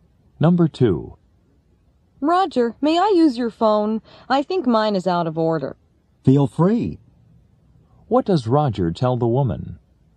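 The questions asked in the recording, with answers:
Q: What does Roger tell the woman?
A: She may use his phone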